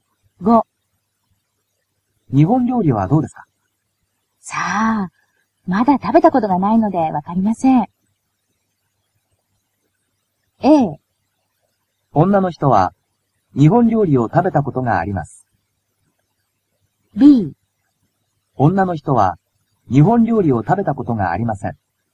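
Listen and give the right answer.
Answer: B: 女の人は日本料理を食べたことがありません。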